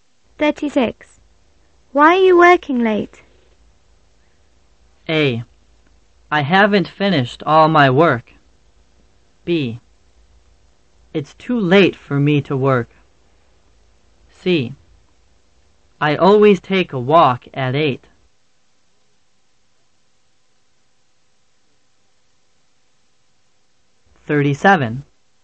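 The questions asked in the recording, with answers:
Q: Why are you working late?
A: A: I haven't finished all my work.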